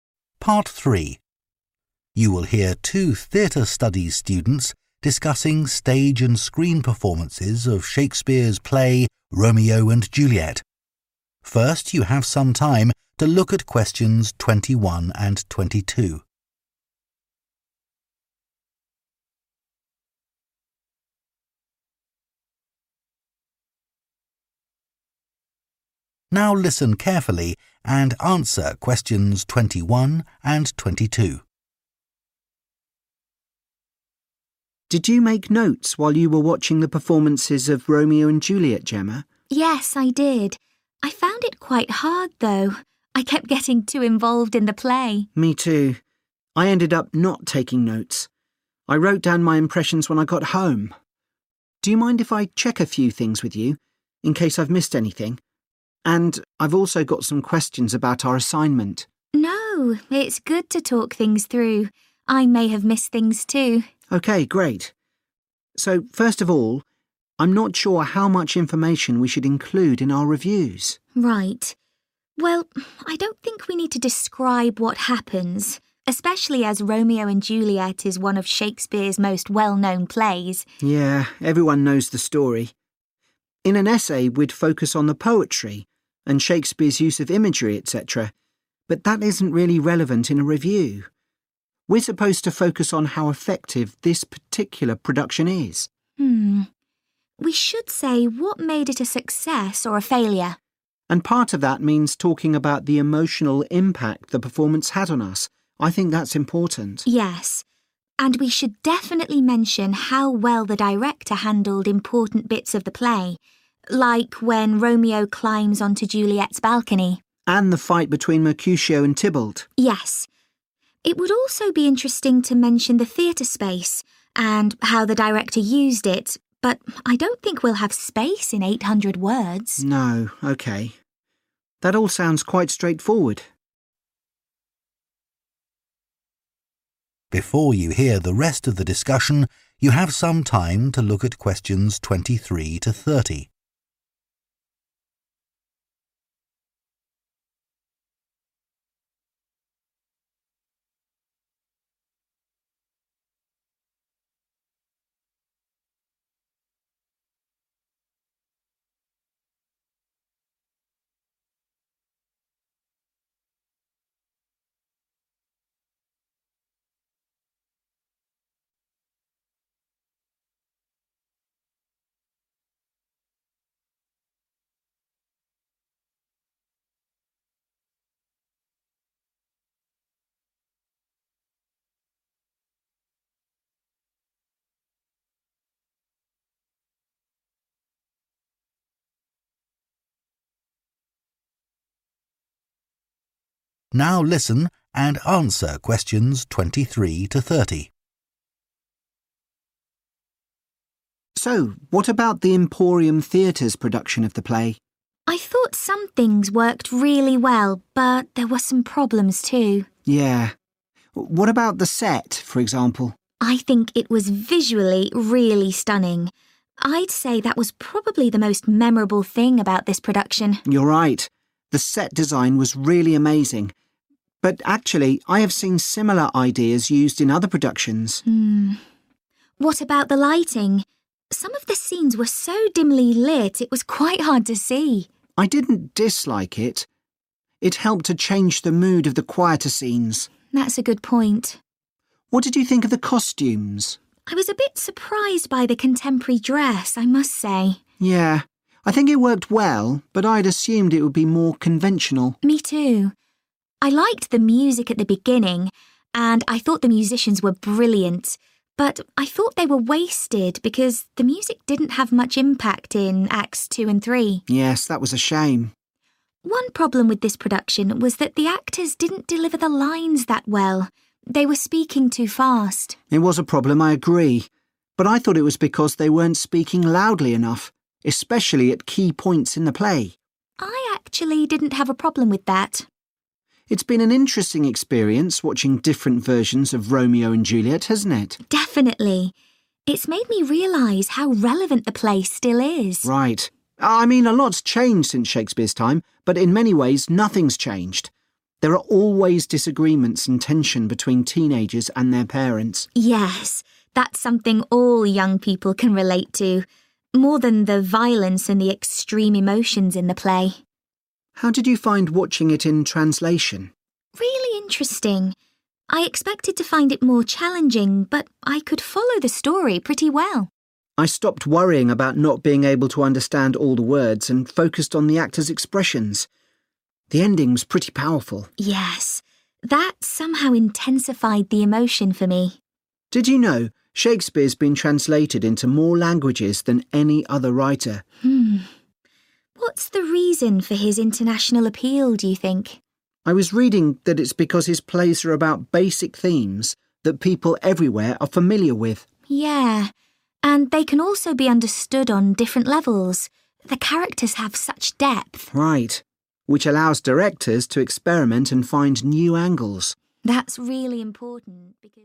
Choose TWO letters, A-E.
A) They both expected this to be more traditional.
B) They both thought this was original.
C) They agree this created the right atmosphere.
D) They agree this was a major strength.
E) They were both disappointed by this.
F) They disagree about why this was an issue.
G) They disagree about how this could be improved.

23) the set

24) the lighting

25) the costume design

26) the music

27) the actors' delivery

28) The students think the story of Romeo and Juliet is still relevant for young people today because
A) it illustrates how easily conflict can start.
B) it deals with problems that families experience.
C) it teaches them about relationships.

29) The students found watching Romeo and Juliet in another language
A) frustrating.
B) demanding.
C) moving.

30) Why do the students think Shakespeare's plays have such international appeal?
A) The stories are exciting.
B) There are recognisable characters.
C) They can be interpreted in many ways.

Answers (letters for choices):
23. D
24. C
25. A
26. E
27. F
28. B
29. C
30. C